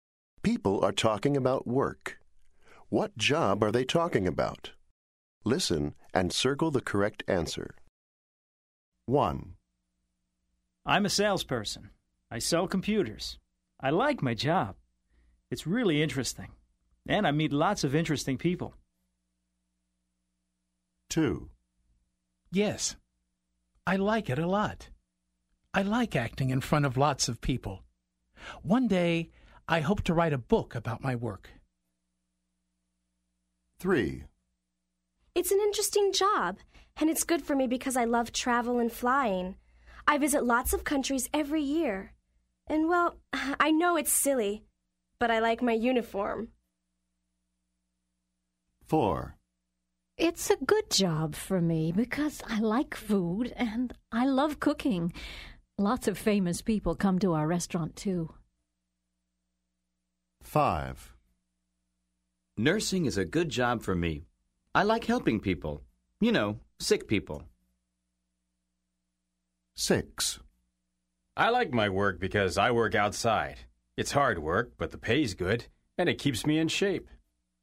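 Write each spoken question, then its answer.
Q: What job are they talking about?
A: salesperson

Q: What job are they talking about?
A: chef

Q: What job are they talking about?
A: nurse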